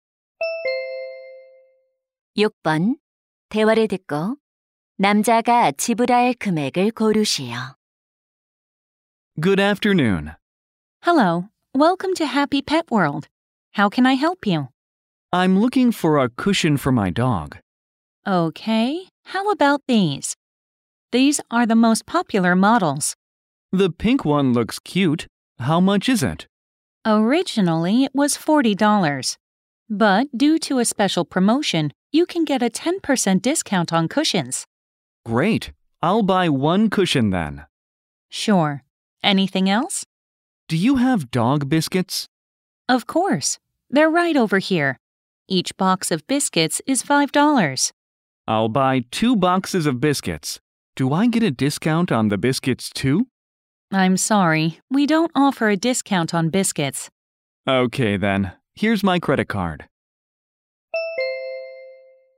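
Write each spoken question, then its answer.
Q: 대화를 듣고 남자가 지불할 금액을 고르시오.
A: 46달러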